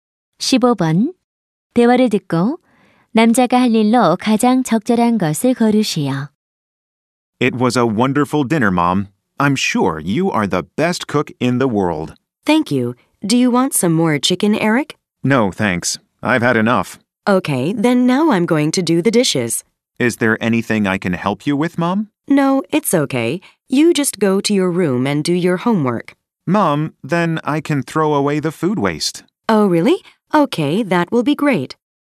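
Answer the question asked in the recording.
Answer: 음식물 쓰레기 버리기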